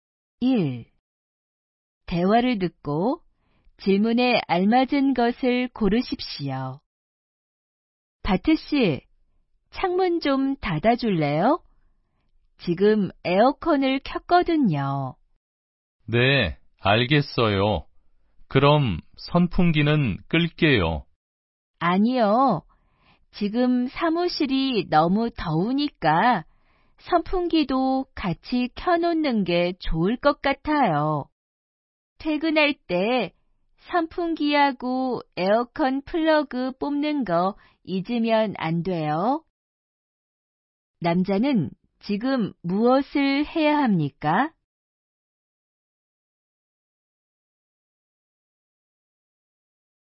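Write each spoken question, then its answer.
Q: 남자는 지금 무엇을 해야 합니까?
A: 창문을 닫아야 합니다.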